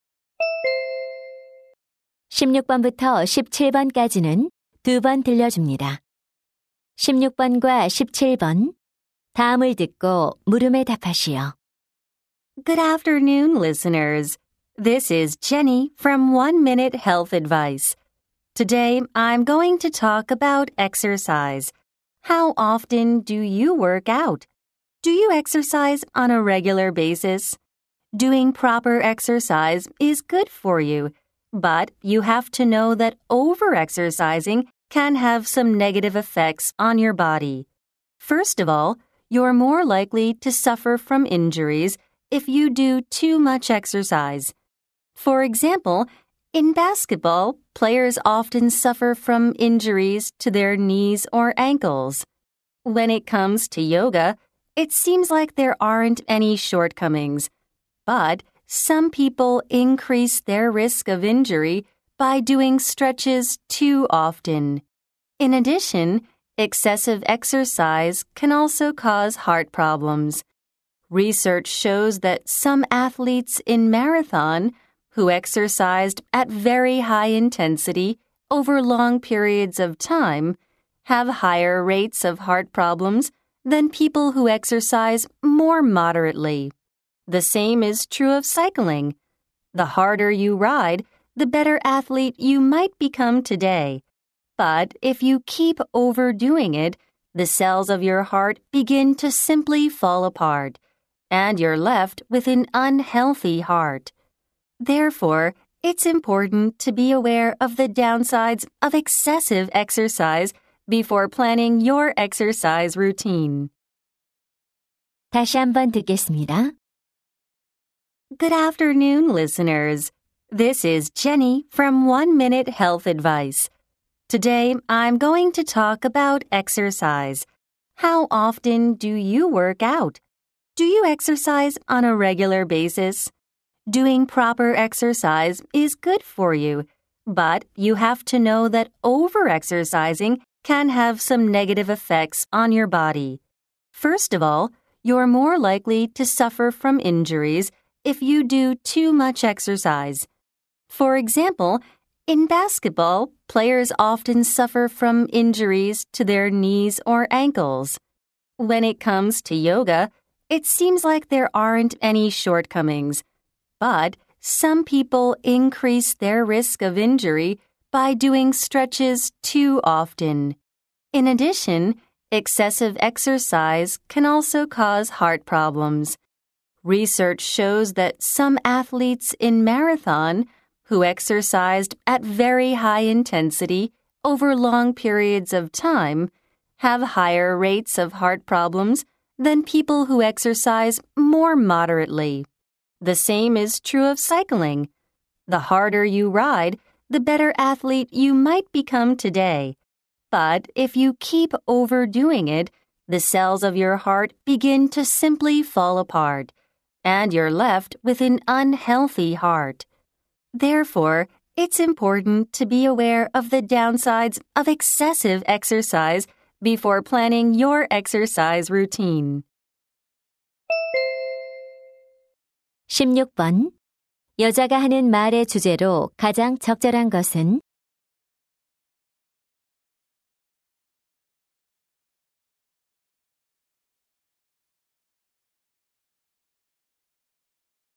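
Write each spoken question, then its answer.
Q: 여자가 하는 말의 주제로 가장 적절한 것은?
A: 과도한 운동이 몸에 미치는 부정적 영향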